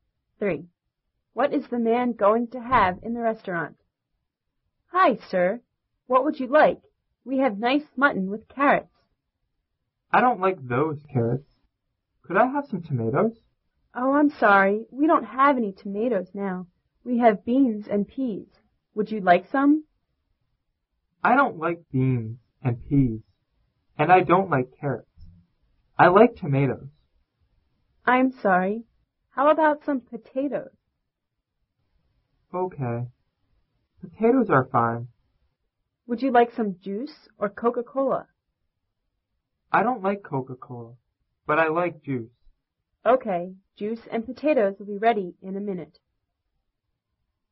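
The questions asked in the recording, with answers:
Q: What is the man going to have in the restaurant?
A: Potatoes and juice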